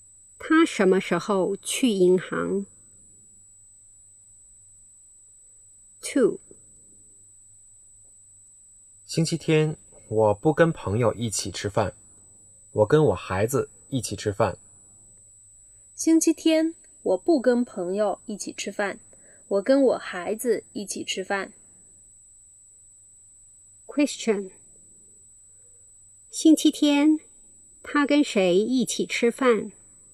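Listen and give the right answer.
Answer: 跟他孩子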